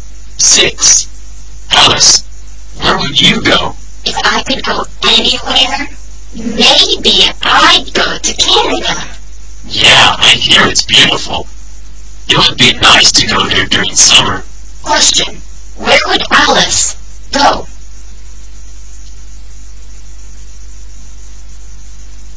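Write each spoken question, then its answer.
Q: Question, where would Alice go?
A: Canada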